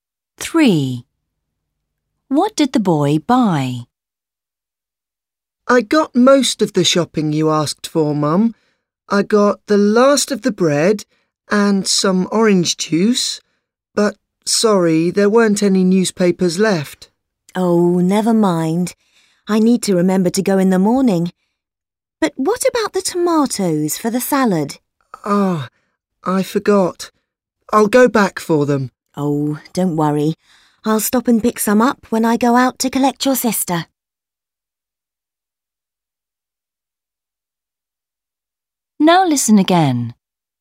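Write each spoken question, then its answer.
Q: What did the boy buy?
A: bread and orange juice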